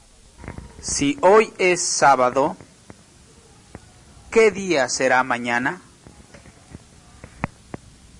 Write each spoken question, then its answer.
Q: Si hoy es sábado, ¿qué día será mañana?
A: Será domingo.